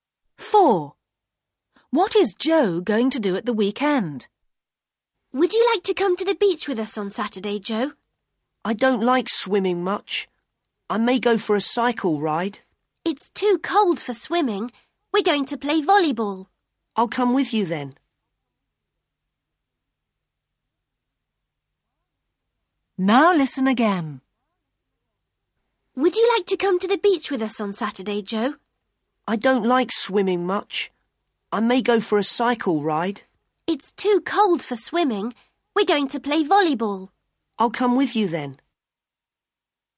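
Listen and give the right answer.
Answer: play volleyball at the beach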